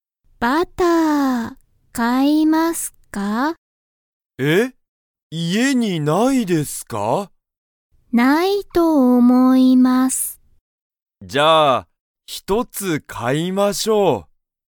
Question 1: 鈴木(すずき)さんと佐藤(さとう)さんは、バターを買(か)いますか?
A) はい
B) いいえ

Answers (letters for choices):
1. A

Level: Level 1